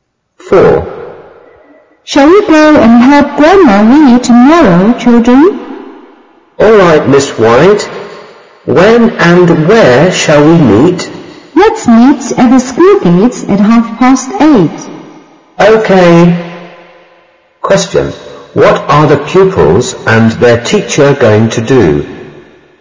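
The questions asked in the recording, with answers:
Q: What are the pupils and their teacher going to do?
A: Help Grandma Lee tomorrow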